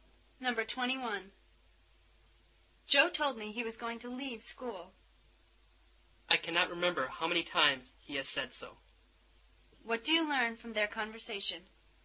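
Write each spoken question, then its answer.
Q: What do you learn from their conversation?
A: Joe has often said he will leave school, but he hasn't done it.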